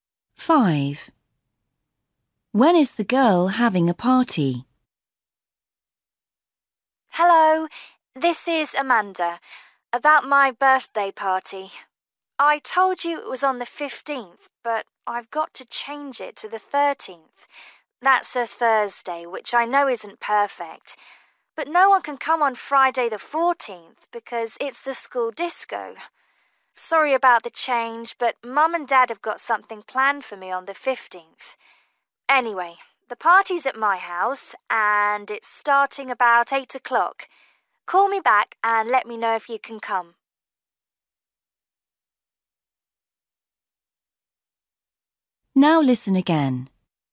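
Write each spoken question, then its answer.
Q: When is the girl having a party?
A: Thursday the 13th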